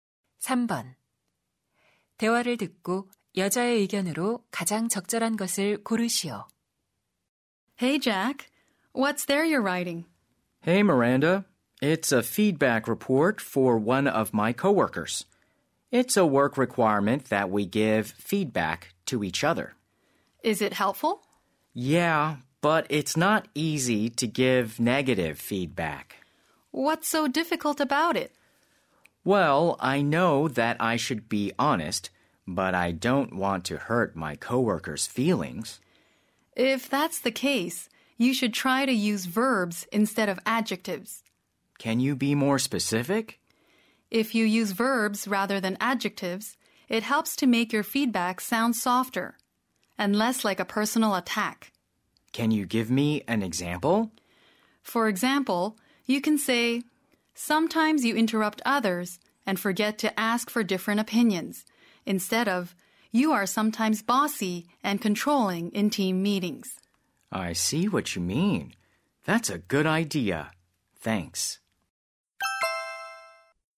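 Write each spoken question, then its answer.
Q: 대화를 듣고 여자의 의견으로 가장 적절한 것을 고르시오.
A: 부정적인 피드백을 할 때는 형용사 대신 동사를 사용하는 것이 좋다.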